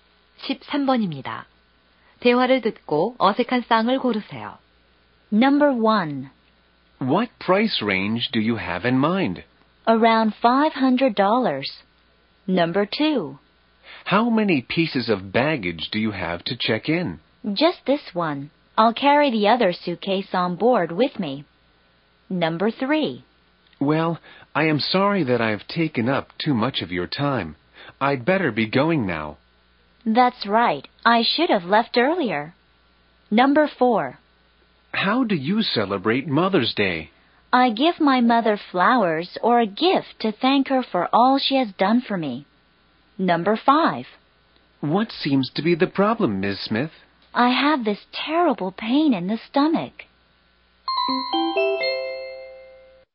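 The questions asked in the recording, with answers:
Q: 대화를 듣고 어색한 쌍을 고르세요.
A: 3: Well, I am sorry that I've taken up too much of your time. I'd better be going now. / That's right. I should have left earlier.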